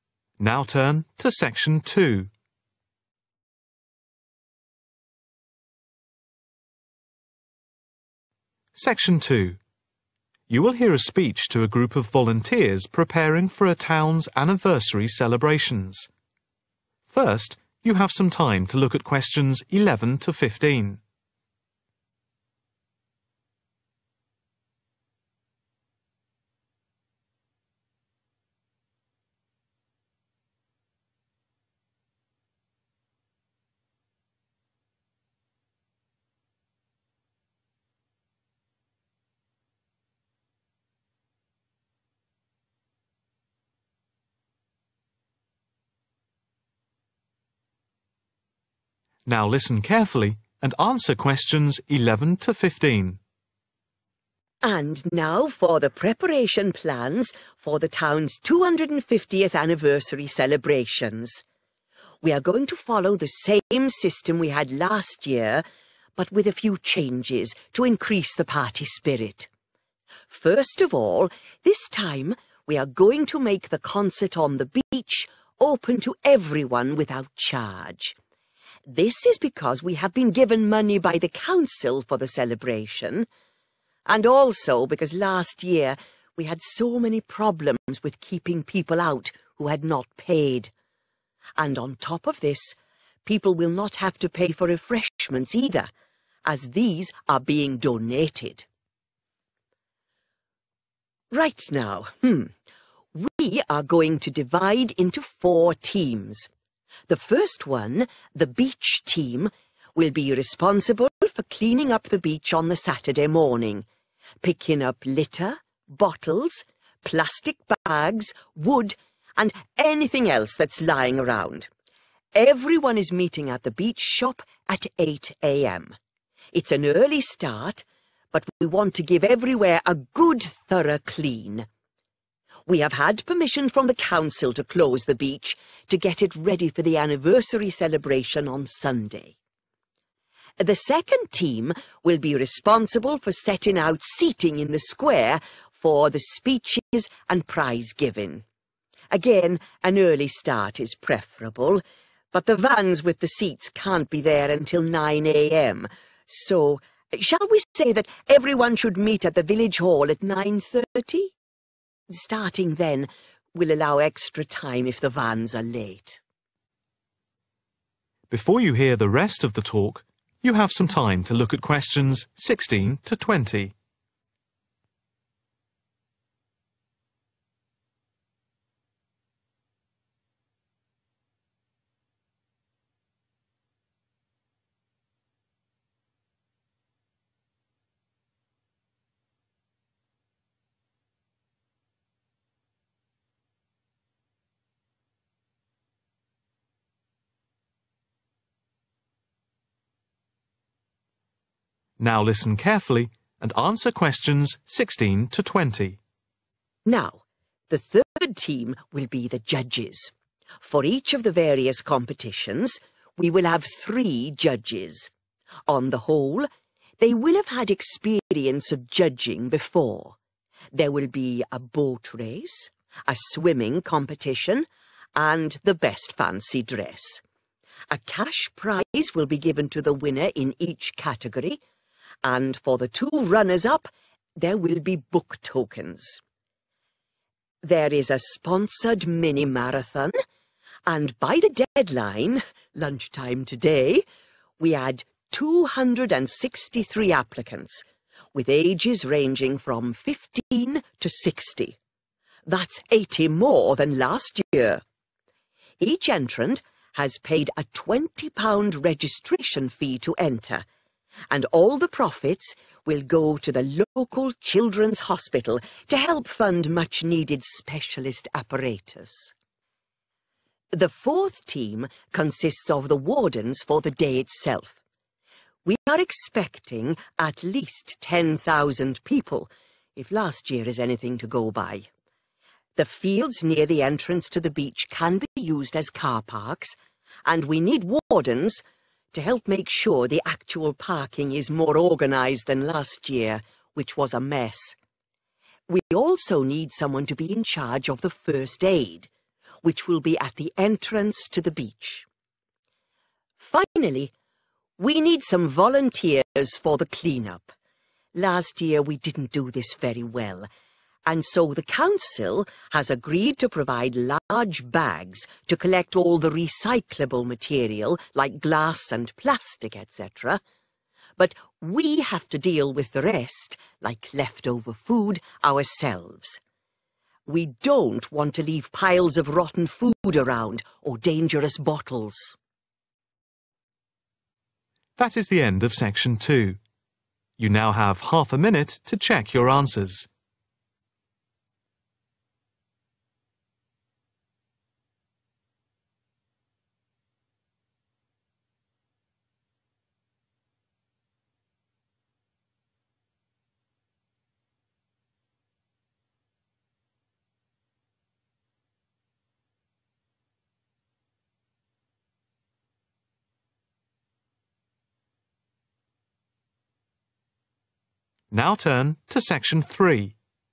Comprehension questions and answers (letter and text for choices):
Choose TWO letters, A–E.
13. Beach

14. arrange a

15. am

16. What does the speaker say about the judges in the competitions?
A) Most people judging will have some experience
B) None of the judges will have experience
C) Every judge will be experienced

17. The winner in each of the competitions will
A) be given vouchers.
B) be awarded a cash prize.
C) receive book-tokens.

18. The profits from the marathon will be given to the Children's Hospital to help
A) buy new specialist equipment.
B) decorate the hospital wards.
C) provide books for the children.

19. Wardens will be needed at the car park because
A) they helped organize the parking well last year.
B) the parking last year was disorganized.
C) they will be needed to collect parking fees.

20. Bags will be provided by the council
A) for all the rubbish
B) only for food rubbish.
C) only for material that can be recycled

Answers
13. shop
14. seating
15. 9.30
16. A) Most people judging will have some experience
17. B) be awarded a cash prize.
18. A) buy new specialist equipment.
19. B) the parking last year was disorganized.
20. C) only for material that can be recycled